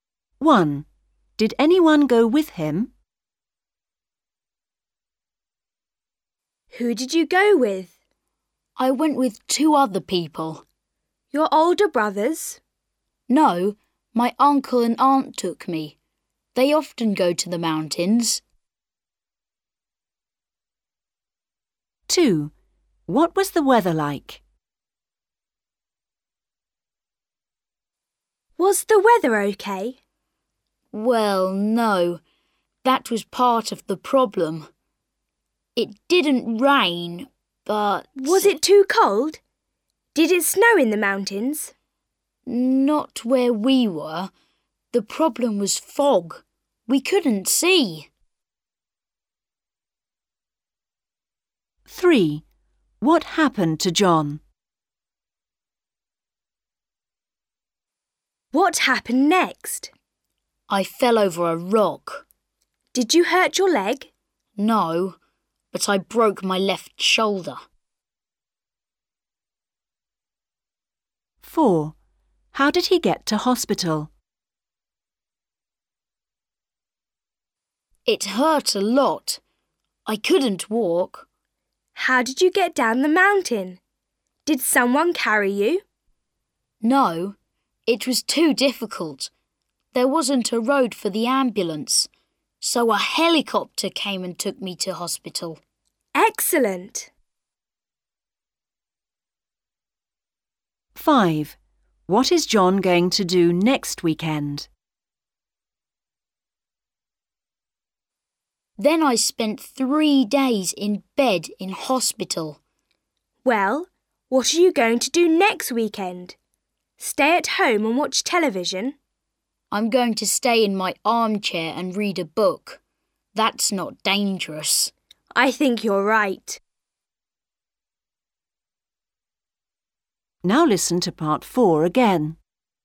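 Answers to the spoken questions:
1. Yes, his uncle and aunt
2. Foggy
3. He fell over a rock and broke his left shoulder
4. By helicopter
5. Stay in his armchair and read a book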